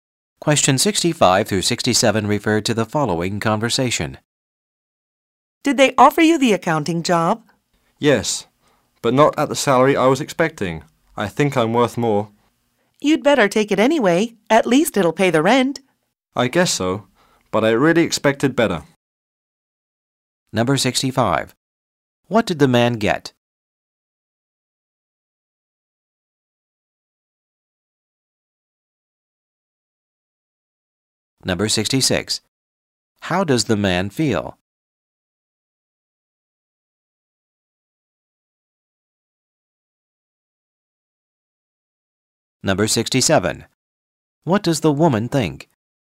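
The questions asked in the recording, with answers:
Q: What did the man get?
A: A job offer for the accounting job

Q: How does the man feel?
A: Disappointed with the salary

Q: What does the woman think?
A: He should take the job anyway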